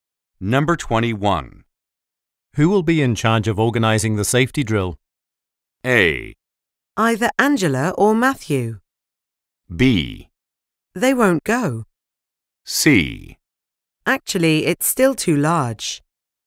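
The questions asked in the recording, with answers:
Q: Who will be in charge of organizing the safety drill?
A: A: Either Angela or Matthew.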